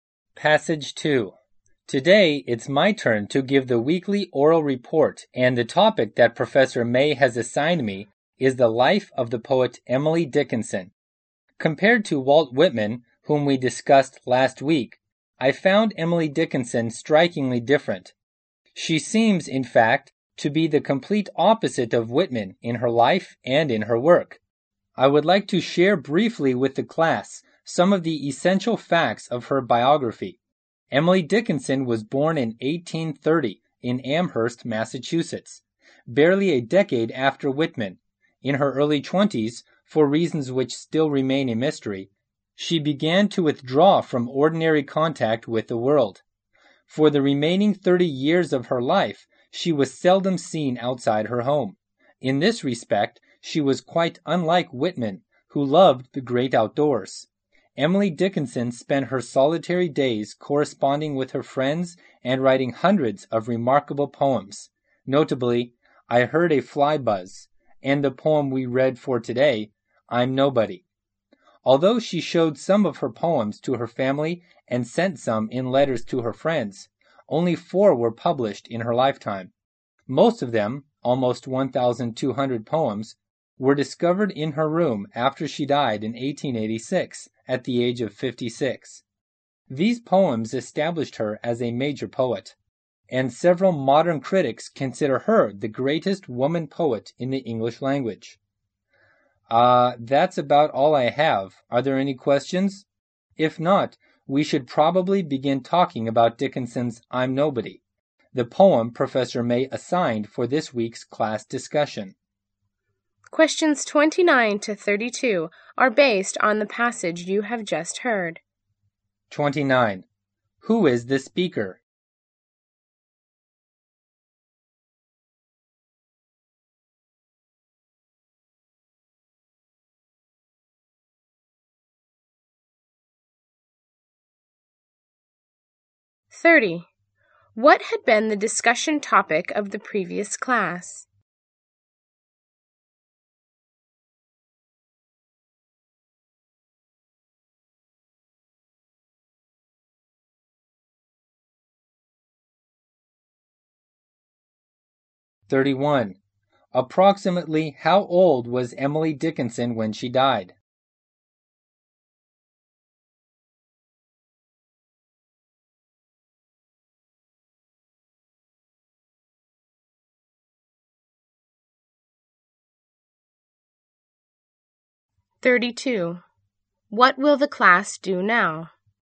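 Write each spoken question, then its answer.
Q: Who is the speaker?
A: A student.

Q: What had been the discussion topic of the previous class?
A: Walt Whitman.

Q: Approximately how old was Emily Dickinson when she died?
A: 56.

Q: What will the class do now?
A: Discuss the poem I'm Nobody.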